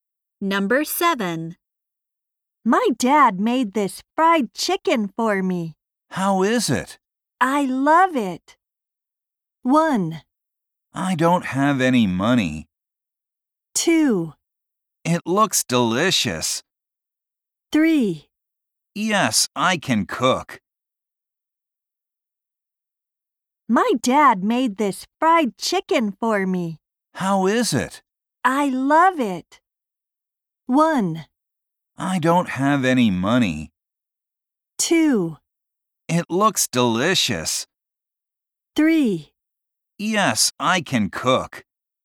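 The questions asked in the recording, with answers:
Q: I love it.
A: 2: It looks delicious.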